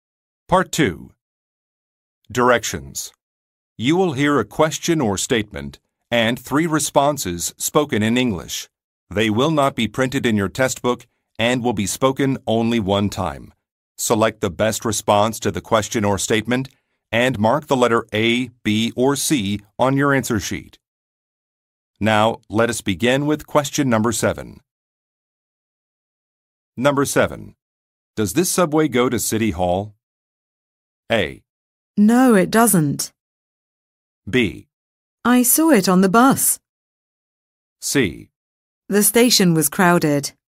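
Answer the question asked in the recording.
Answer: No, it doesn't.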